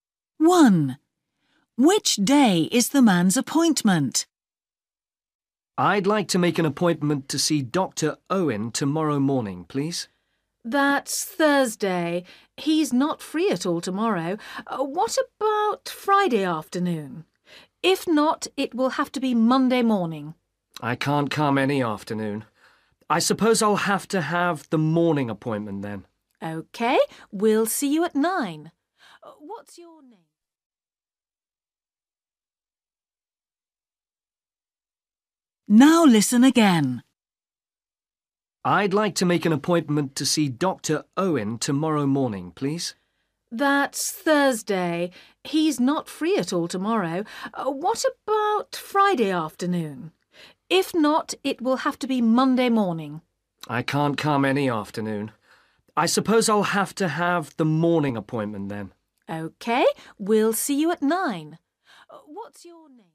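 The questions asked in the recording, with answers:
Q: Which day is the man's appointment?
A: Monday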